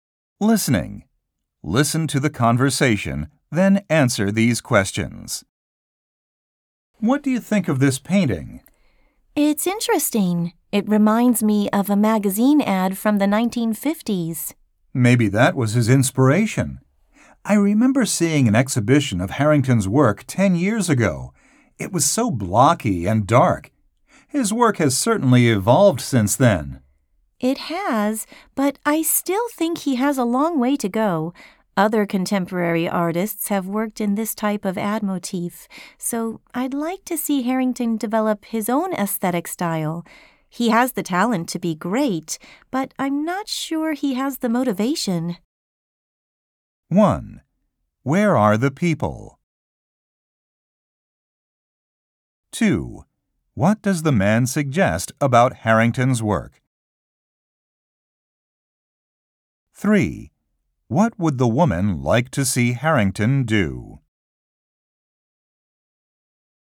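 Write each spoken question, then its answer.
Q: What would the woman like to see Harrington do?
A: Develop his own aesthetic style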